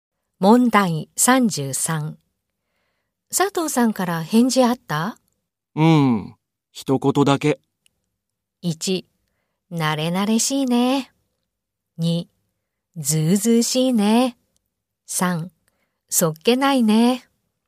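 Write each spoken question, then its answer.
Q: 佐藤さんから返事あった?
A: 3: そっけないね。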